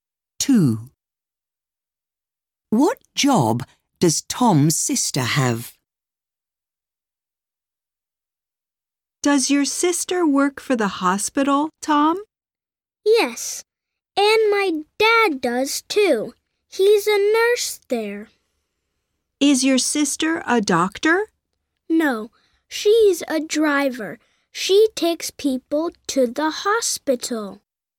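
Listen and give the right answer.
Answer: She is a driver.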